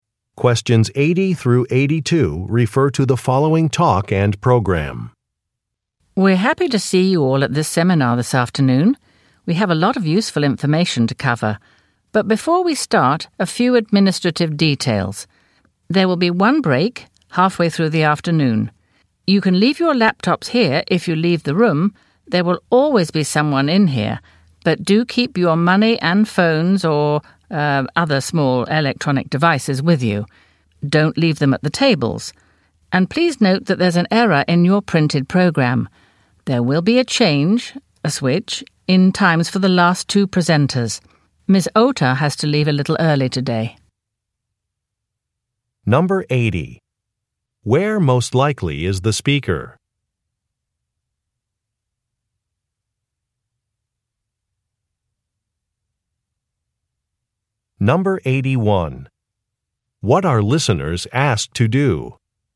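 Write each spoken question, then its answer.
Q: Where most likely is the speaker?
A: At a seminar

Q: What are listeners asked to do?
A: Keep their money, phones and small electronic devices with them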